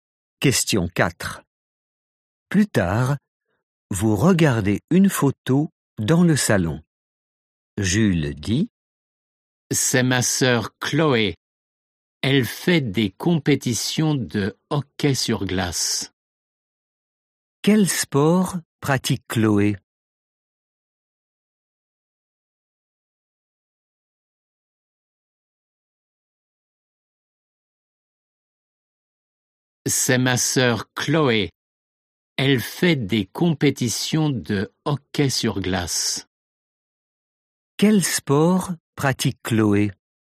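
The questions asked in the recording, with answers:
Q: Quel sport pratique Chloé?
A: le hockey sur glace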